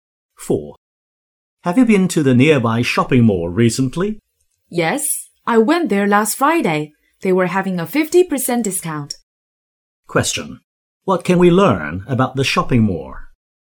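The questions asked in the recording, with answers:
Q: What can we learn about the shopping mall?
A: It was having a 50% discount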